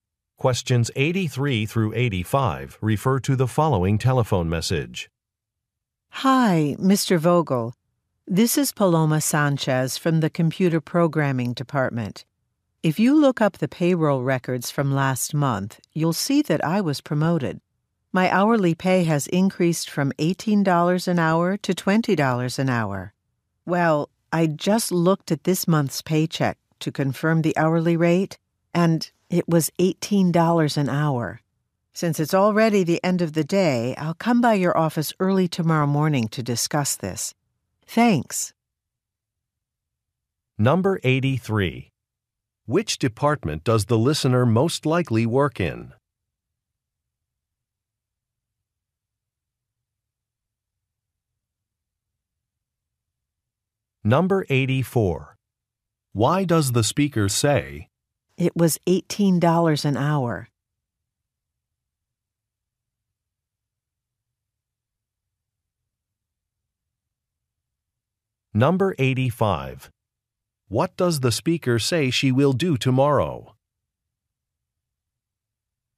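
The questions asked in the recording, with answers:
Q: Which department does the listener most likely work in?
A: Payroll

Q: What does the speaker say she will do tomorrow?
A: Come by the listener's office to discuss it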